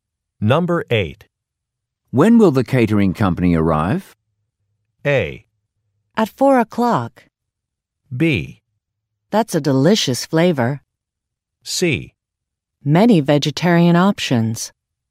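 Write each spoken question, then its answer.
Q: When will the catering company arrive?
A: A: At 4 o'clock.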